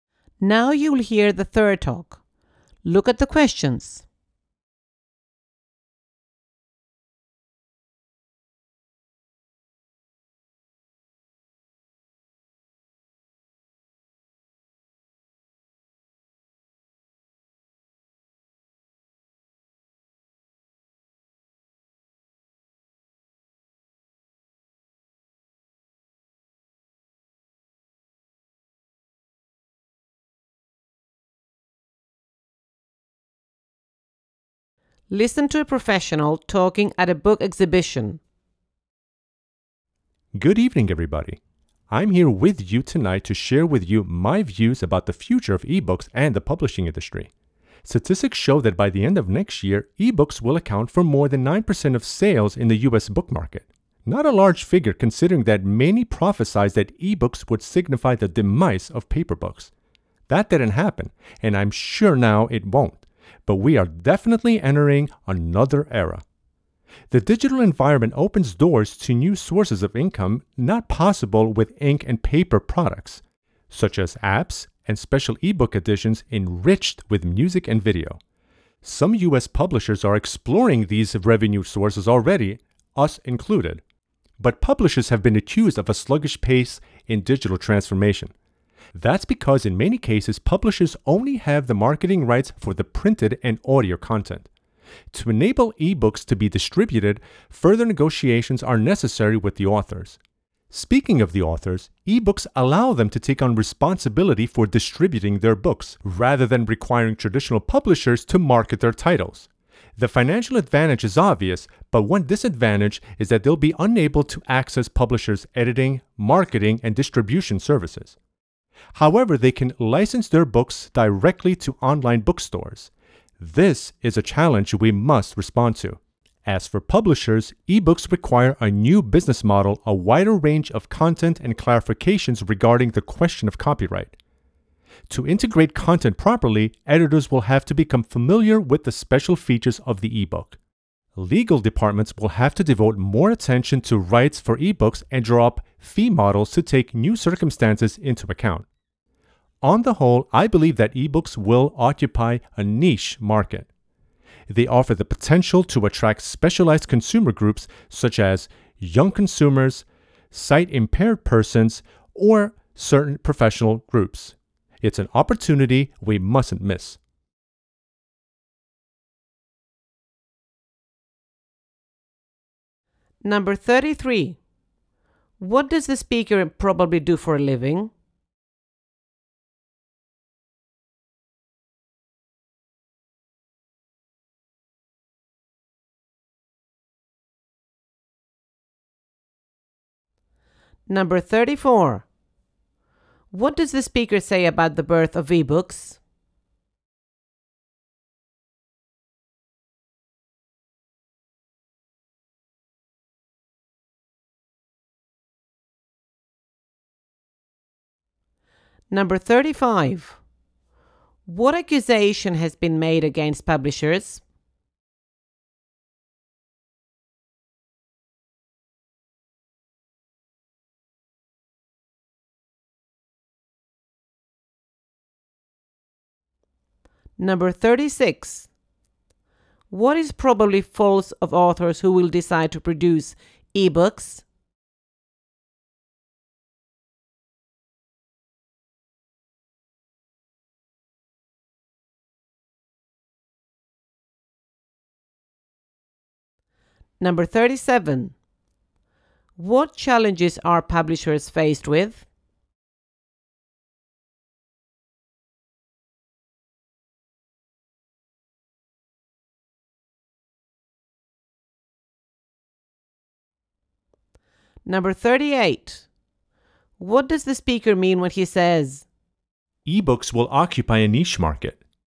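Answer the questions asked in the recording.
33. He works in publishing
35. A sluggish pace in digital transformation
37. A new business model, a wider range of content, and copyright questions
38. Ebooks will appeal to specialized consumer groups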